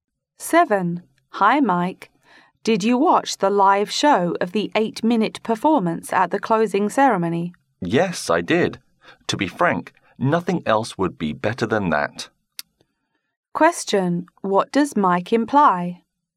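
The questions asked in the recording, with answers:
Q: What does Mike imply?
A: The performance was the best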